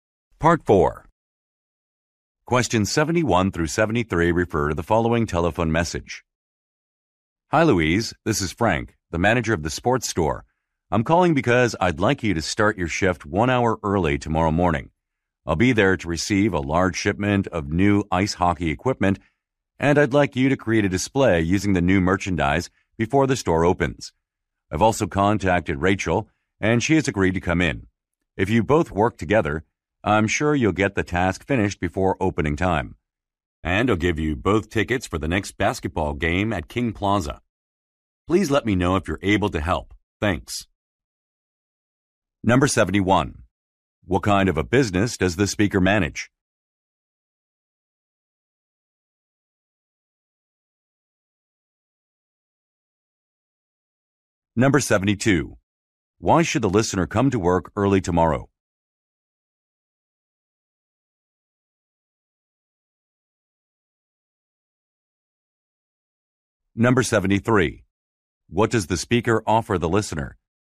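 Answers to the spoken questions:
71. A sports store
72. To create a display of new merchandise
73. Basketball game tickets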